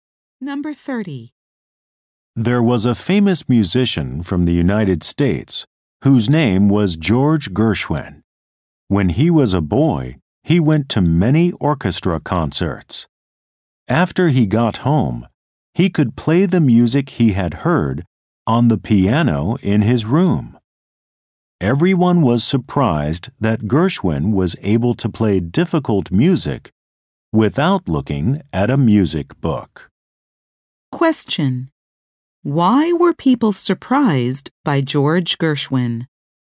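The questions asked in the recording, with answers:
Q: Why were people surprised by George Gershwin?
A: He could play difficult music he had heard without a music book.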